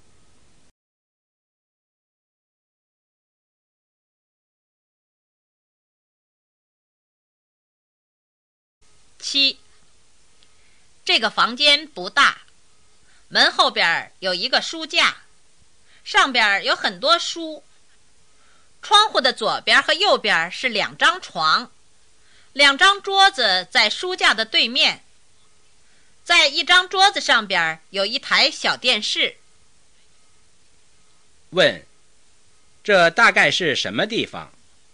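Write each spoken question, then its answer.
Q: 这大概是什么地方?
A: 宿舍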